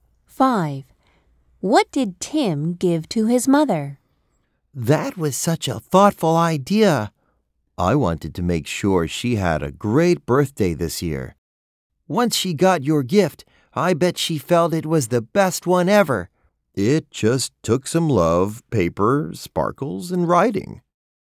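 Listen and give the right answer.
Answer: A handmade birthday card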